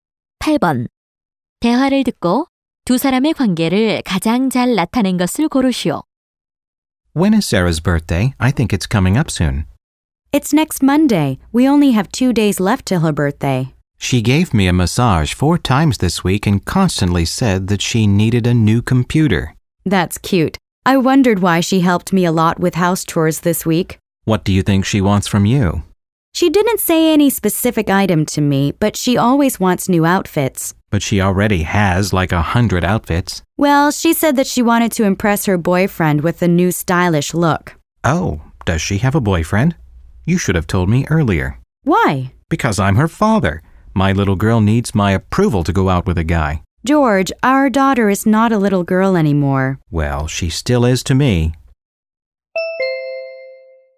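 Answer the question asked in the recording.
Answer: 부부 (사라의 부모)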